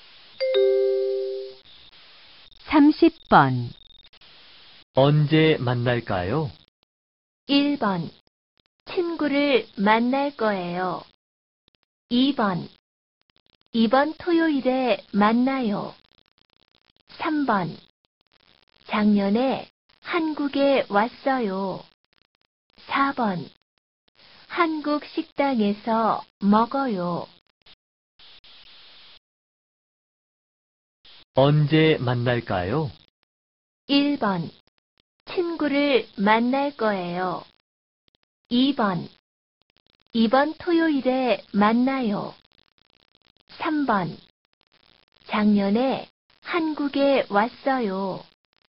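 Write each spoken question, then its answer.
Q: 언제 만날까요?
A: 2: 이번 토요일에 만나요.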